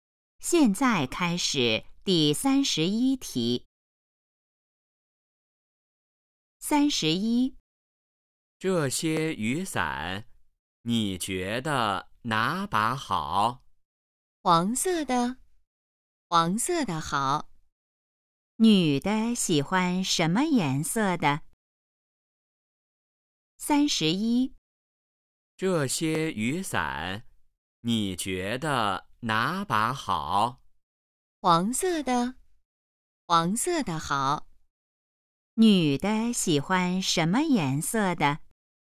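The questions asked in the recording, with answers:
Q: 女的喜欢什么颜色的?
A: 黄色的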